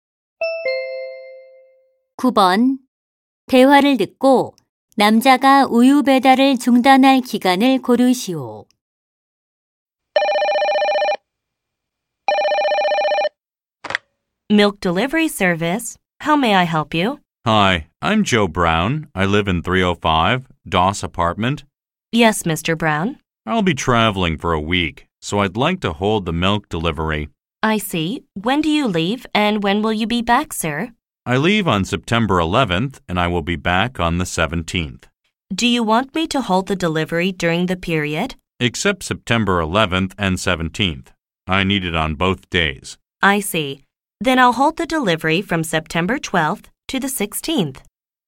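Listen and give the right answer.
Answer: 9월 12일부터 16일까지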